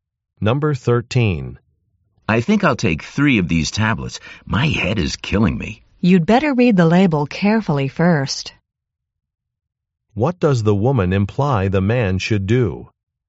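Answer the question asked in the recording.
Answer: Read the label carefully first.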